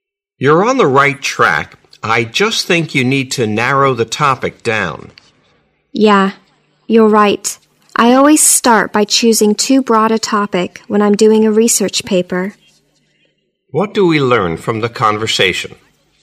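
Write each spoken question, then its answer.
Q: What do we learn from the conversation?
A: The man usually chooses research paper topics that are too broad and needs to narrow his topic.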